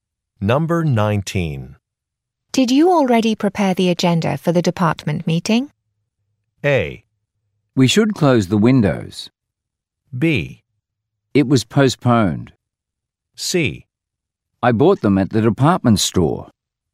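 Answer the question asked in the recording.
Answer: B: It was postponed.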